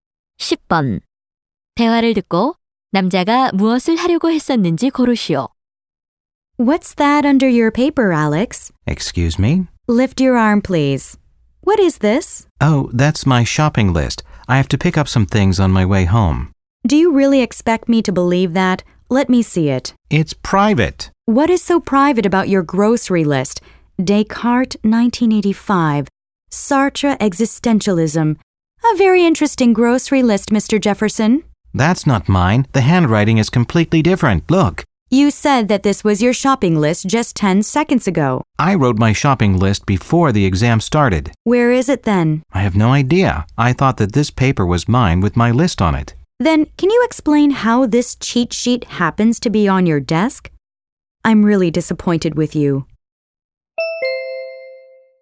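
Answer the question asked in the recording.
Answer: 시험에서 부정행위(커닝)를 하려고 했다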